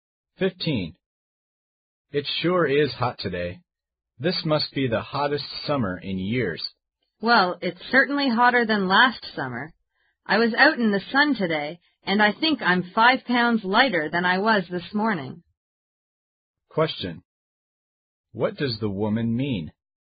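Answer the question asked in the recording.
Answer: It is very hot and she sweated a lot in the sun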